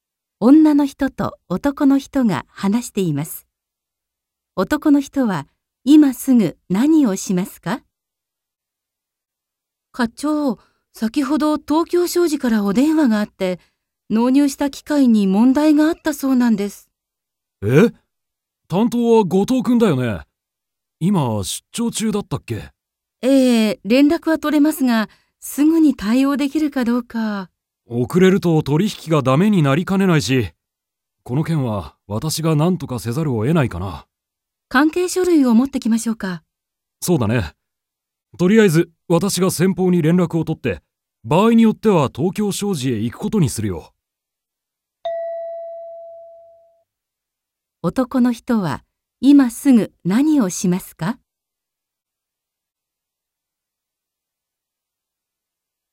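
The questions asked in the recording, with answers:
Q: 男の人は今すぐ何をしますか?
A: 東京商事(先方)に連絡を取る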